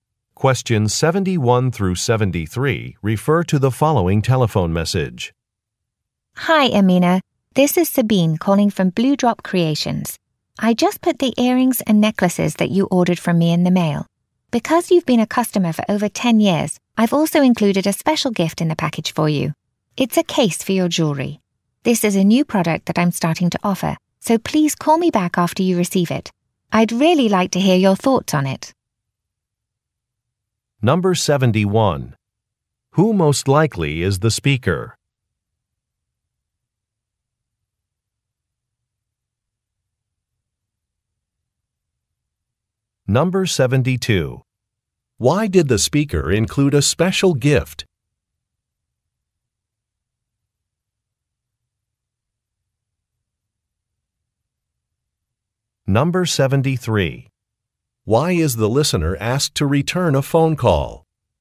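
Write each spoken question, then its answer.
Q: Who most likely is the speaker?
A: A jewelry maker

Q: Why did the speaker include a special gift?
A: The listener has been a customer for over 10 years

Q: Why is the listener asked to return a phone call?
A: To give feedback on a new product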